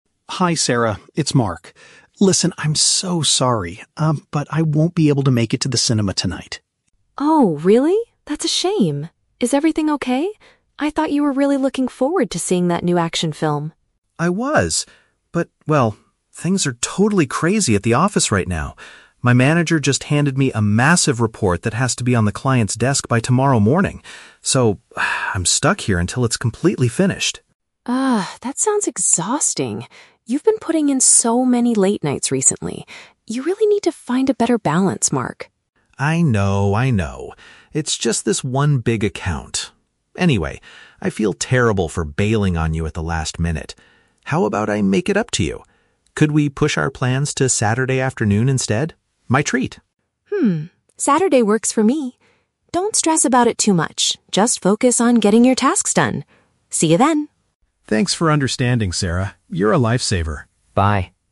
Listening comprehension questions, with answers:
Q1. Why is Mark calling Sarah?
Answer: To inform her that he needs to stay at work.

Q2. What does Sarah think about Mark's situation?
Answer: She is concerned that he is working too much lately.

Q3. What do they agree to do at the end of the conversation?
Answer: Go out together on the weekend instead.

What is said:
Mark: Hi Sarah, it's Mark. Listen, I'm so sorry, um, but I won't be able to make it to the cinema tonight.
Sarah: Oh, really? That's a shame. Is everything okay? I thought you were really looking forward to seeing that new action film.
Mark: I was! But, well... things are totally crazy at the office right now. My manager just handed me a massive report that has to be on the client's desk by tomorrow morning. So, ah, I'm stuck here until it's completely finished.
Sarah: Ugh, that sounds exhausting. You've been putting in so many late nights recently. You really need to find a better balance, Mark.
Mark: I know, I know. It's just this one big account. Anyway, I feel terrible for bailing on you at the last minute. How about I make it up to you? Could we push our plans to Saturday afternoon instead? My treat!
Saturday works for me. Don't stress about it too much, just focus on getting your tasks done. See you then!